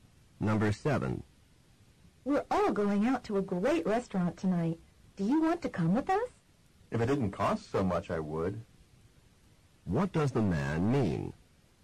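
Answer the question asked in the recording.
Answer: He will not go because it costs too much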